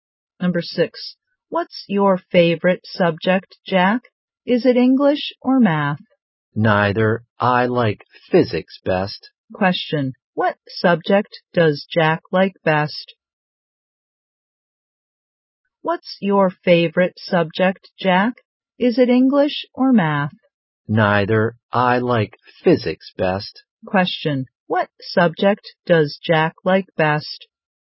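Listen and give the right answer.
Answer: Physics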